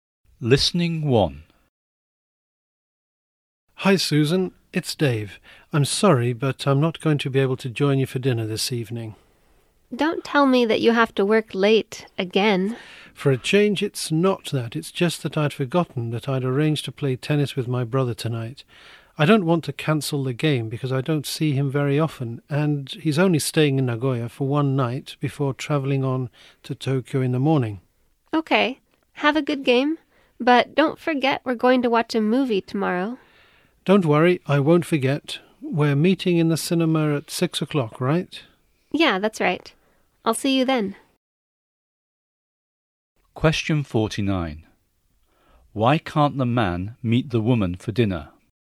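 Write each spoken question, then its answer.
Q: Why can't the man meet the woman for dinner?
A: He arranged to play tennis with his brother tonight.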